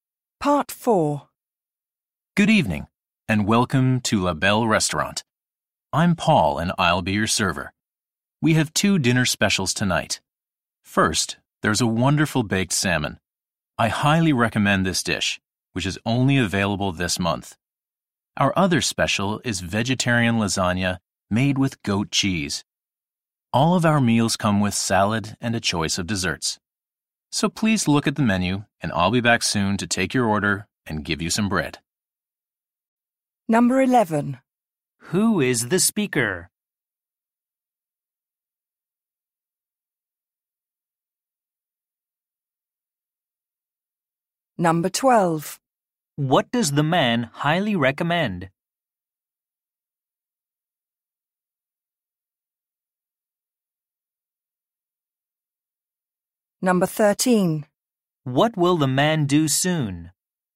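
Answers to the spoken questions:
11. A server at a restaurant
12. The baked salmon
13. Take their order and bring bread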